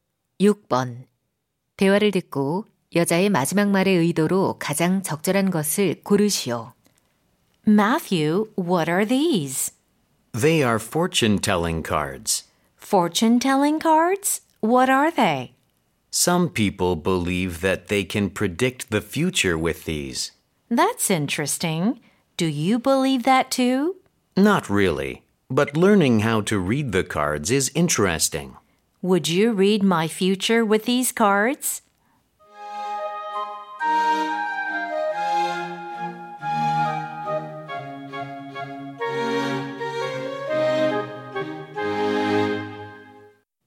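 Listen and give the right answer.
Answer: 요청 (카드로 자신의 미래를 봐 달라고 부탁)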